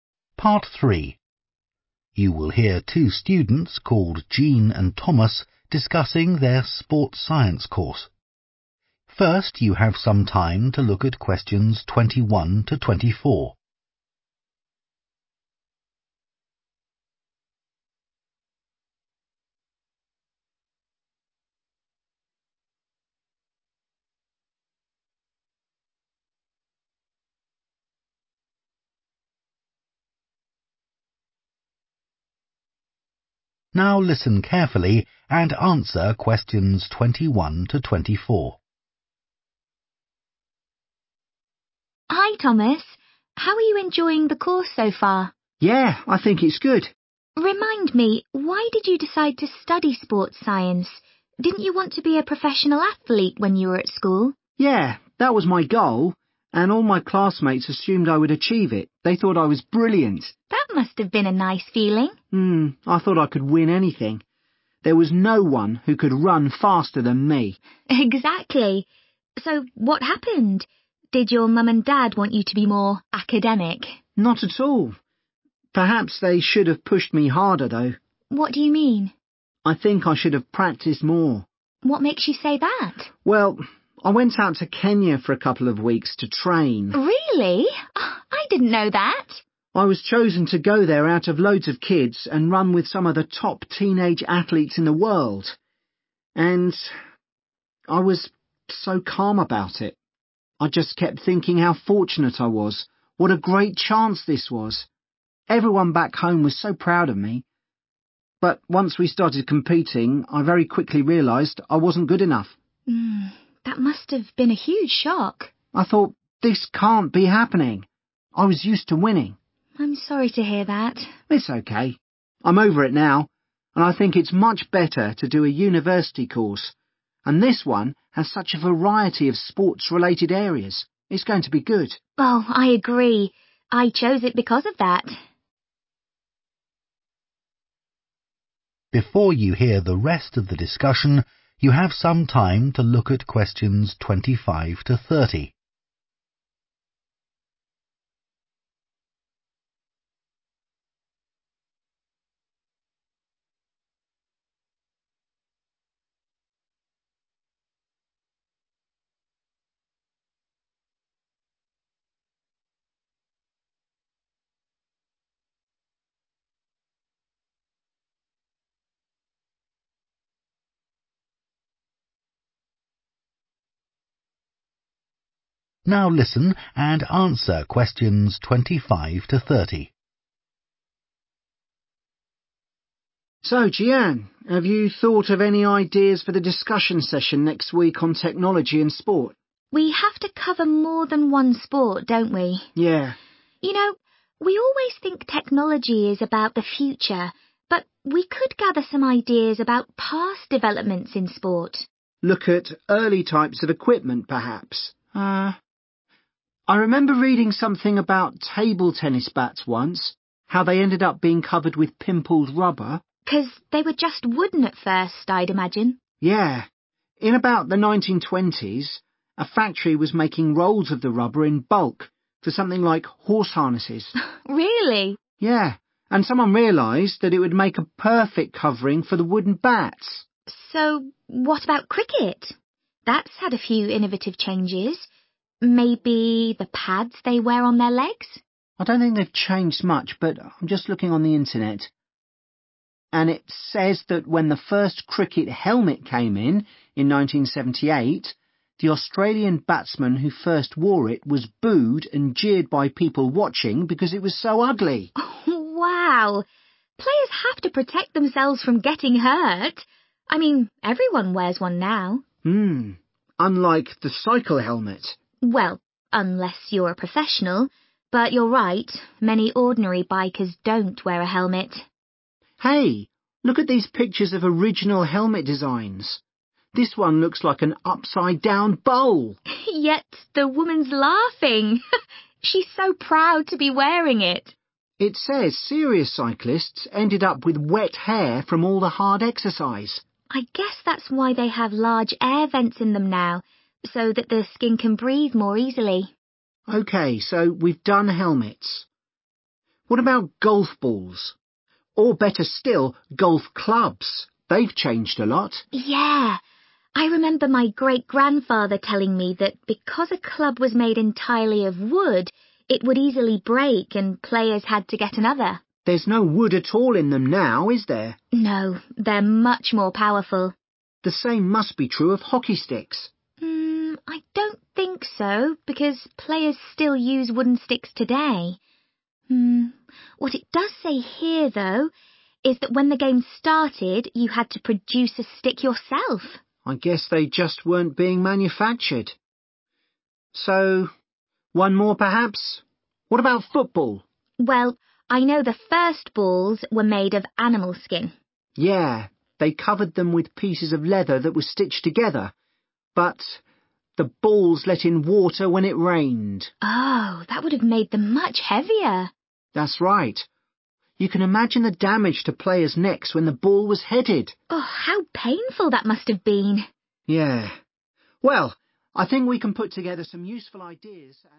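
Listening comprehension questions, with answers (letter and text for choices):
Choose TWO letters, A-E.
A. It could cause excessive sweating.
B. The material was being mass produced for another purpose.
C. People often needed to make their own.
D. It often had to be replaced.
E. The material was expensive.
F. It was unpopular among spectators.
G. It caused injuries.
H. No one using it liked it at first.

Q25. the table tennis bat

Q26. the cricket helmet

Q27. the cycle helmet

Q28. the golf club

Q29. the hockey stick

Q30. the football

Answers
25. B. The material was being mass produced for another purpose.
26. F. It was unpopular among spectators.
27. A. It could cause excessive sweating.
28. D. It often had to be replaced.
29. C. People often needed to make their own.
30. G. It caused injuries.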